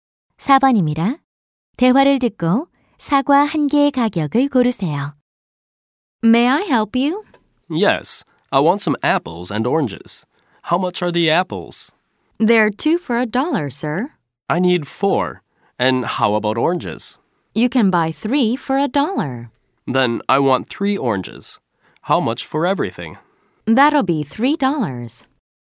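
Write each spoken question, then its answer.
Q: 대화를 듣고 사과 한 개의 가격을 고르세요.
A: 50센트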